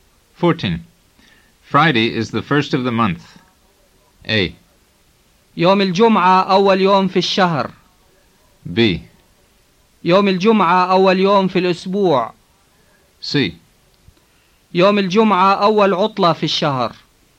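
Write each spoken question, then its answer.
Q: Friday is the first of the month.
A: A: يوم الجمعة أول يوم في الشهر.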